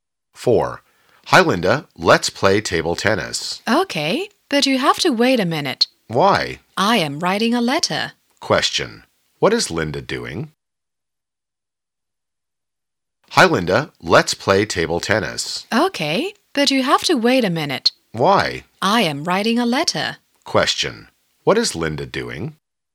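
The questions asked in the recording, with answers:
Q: Question. What is Linda doing?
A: Writing a letter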